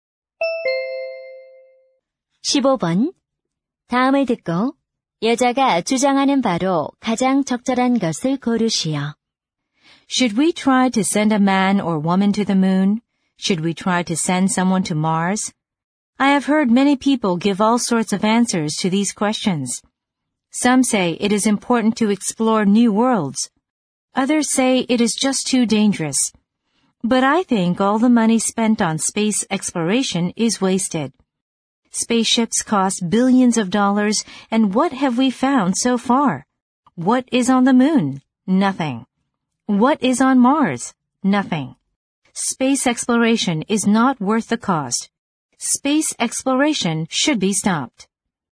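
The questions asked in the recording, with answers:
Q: 다음을 듣고 여자가 주장하는 바로 가장 적절한 것을 고르시오.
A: 우주 탐사는 비용만큼 가치가 없으므로 중단해야 한다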